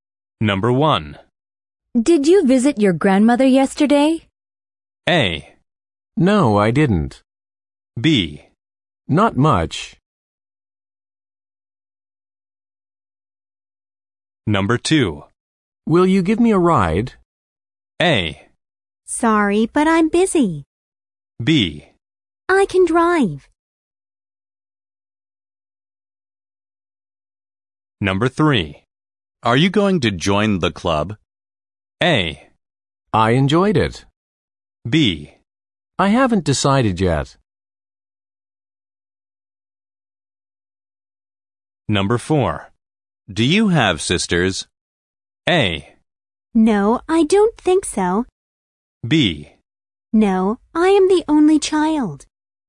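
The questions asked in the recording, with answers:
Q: Did you visit your grandmother yesterday?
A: A: No, I didn't.

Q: Will you give me a ride?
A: A: Sorry, but I'm busy.

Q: Are you going to join the club?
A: B: I haven't decided yet.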